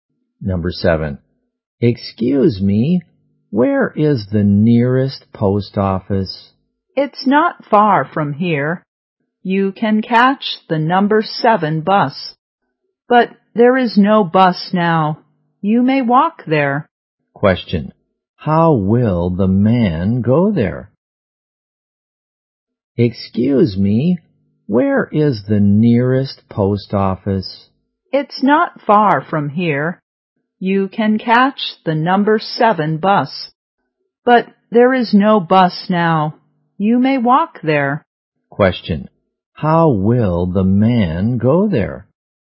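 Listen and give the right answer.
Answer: On foot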